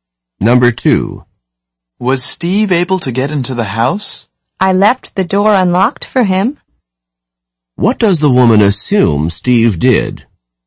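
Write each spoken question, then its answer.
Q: What does the woman assume Steve did?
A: He got in through the unlocked door.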